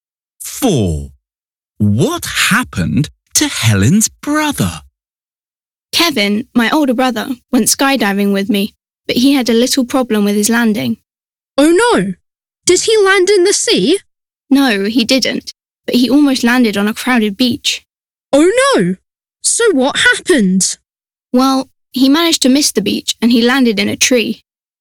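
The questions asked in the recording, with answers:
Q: What happened to Helen's brother?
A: He landed in a tree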